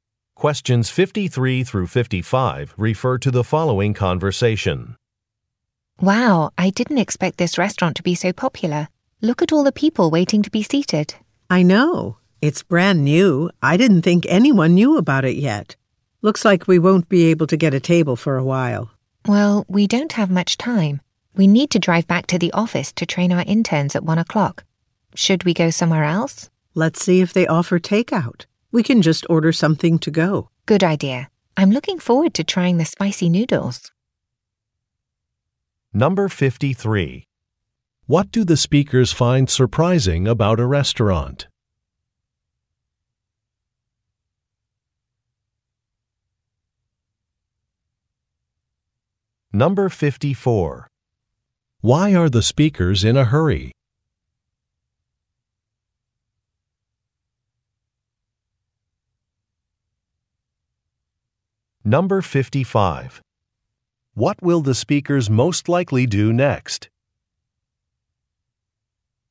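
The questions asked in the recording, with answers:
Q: What do the speakers find surprising about a restaurant?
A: It is so popular

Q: Why are the speakers in a hurry?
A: They must train interns at 1 o'clock

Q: What will the speakers most likely do next?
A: Order takeout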